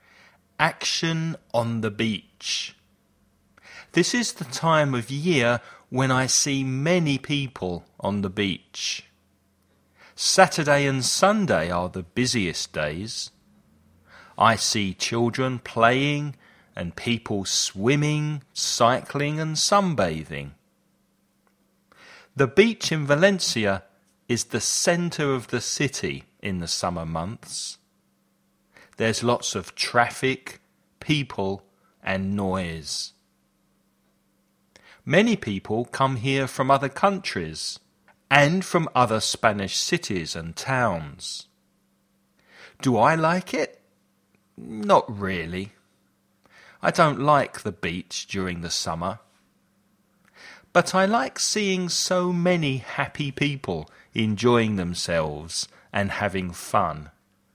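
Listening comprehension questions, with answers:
Escucha y contesta a las preguntas.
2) ¿En qué época del año es la playa la parte más céntrica de la ciudad?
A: En los meses de verano

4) ¿Le gusta al protagonista la playa durante el verano?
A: No mucho; no le gusta la playa en verano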